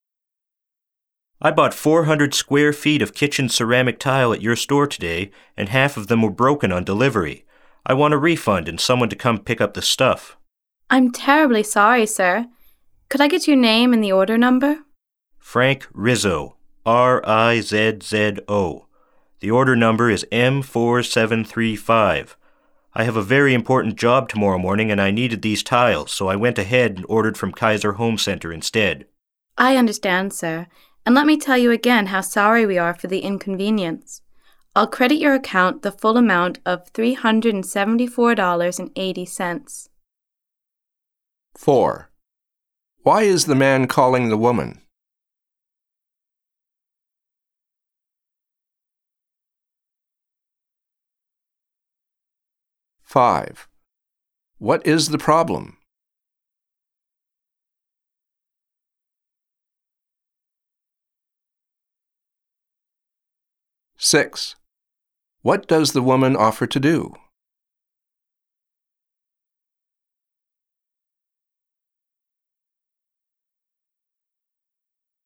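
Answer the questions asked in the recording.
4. To complain about broken tiles and ask for a refund
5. Half of the tiles were broken on delivery
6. Credit his account the full amount of $374.80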